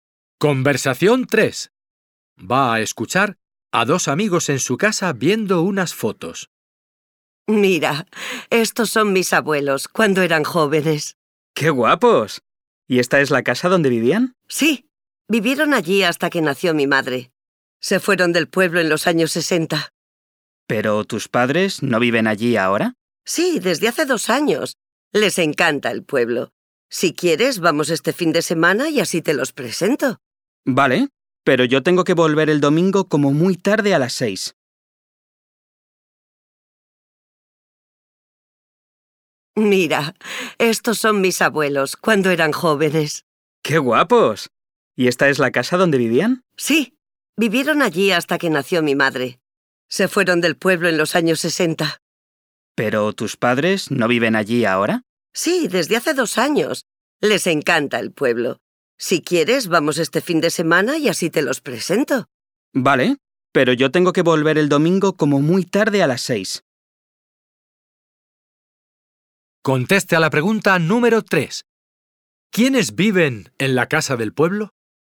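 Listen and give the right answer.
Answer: Los padres del hombre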